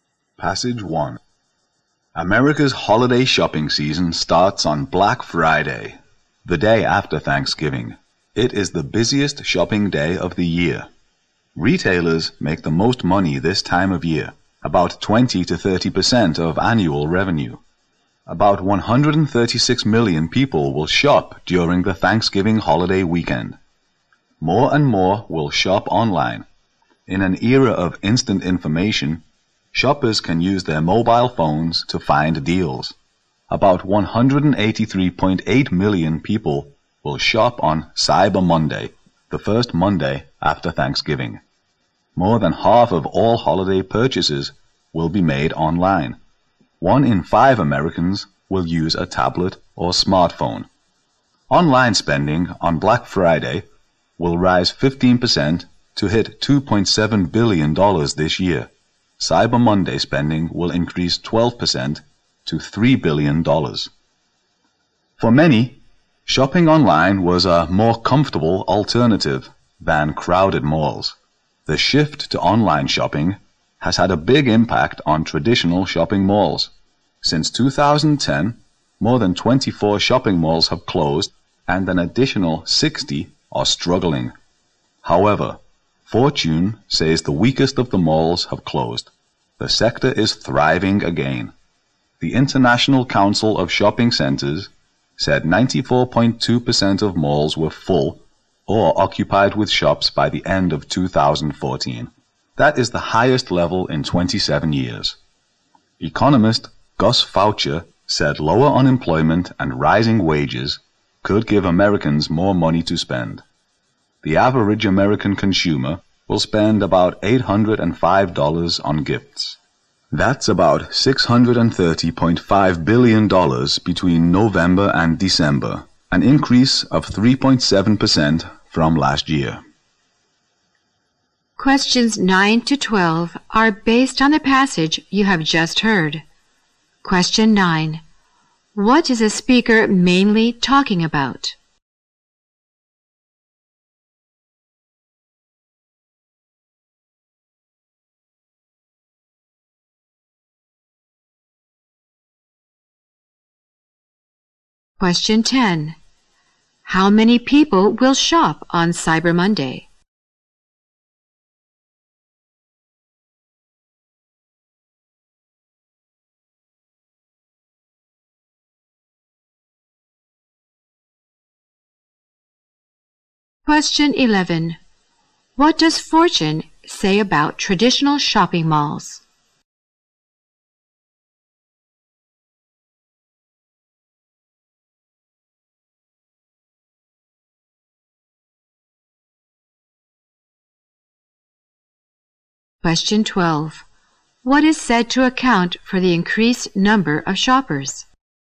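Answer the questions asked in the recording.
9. America's holiday shopping season
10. About 183.8 million
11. The weakest have closed and the sector is thriving again
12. Lower unemployment and rising wages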